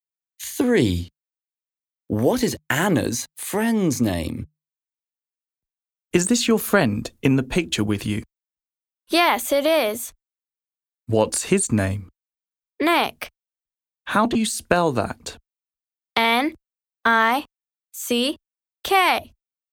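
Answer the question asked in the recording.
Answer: Nick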